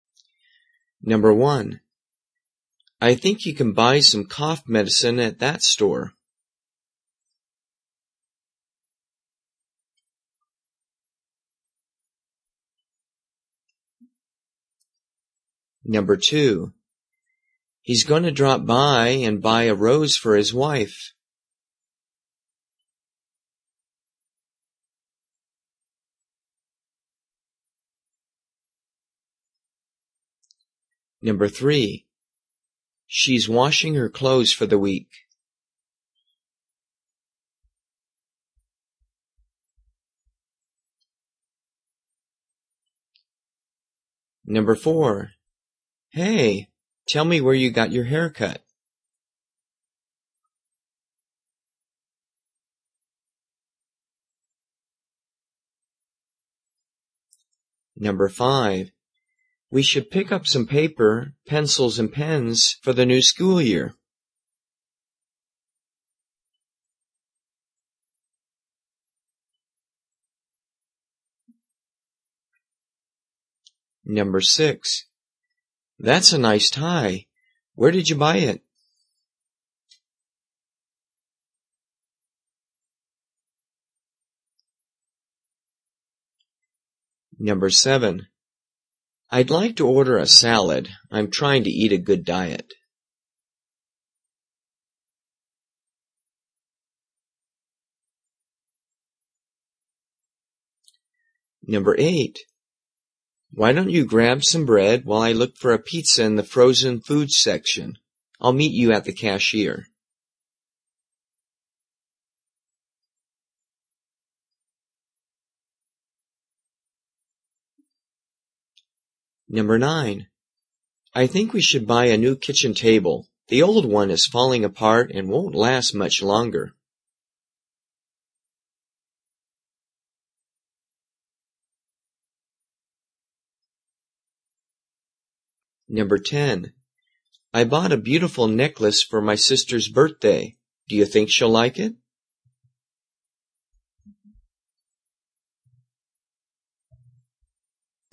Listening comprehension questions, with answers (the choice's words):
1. I think you can buy some ___________ at that store.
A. hardware store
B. bakery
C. pharmacy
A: pharmacy

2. He's going to drop by and buy __________________.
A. flower shop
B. auto shop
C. candy store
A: flower shop

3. She's _____________________________ for the week.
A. car wash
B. coffee shop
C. laundromat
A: laundromat

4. Hey. Tell me where you _________________________.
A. shoe shop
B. computer store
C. hairdresser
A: hairdresser

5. We should pick up some ___________, _____________, and ___________ for the new ____________________.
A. office supply store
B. library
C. bike shop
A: office supply store

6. ______________________________. Where did you buy it?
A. clothing store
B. eyeglasses store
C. carpet store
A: clothing store

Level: 初级